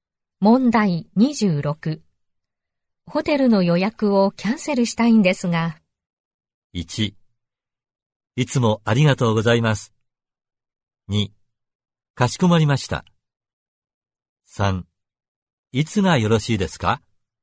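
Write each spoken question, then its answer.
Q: ホテルの予約をキャンセルしたいんですが。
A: 2: かしこまりました。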